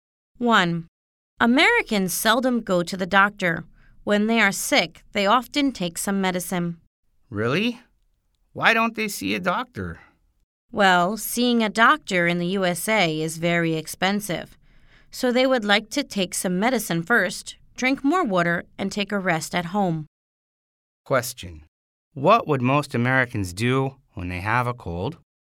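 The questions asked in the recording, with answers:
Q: What would most Americans do when they have a cold?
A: Take some medicine first, drink more water, and rest at home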